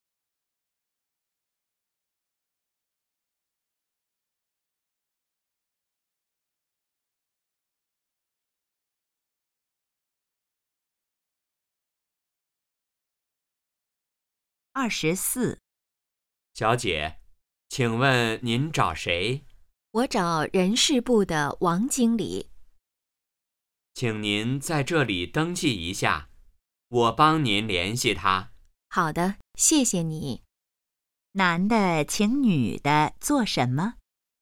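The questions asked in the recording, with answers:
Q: 男的请女的做什么?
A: 登记一下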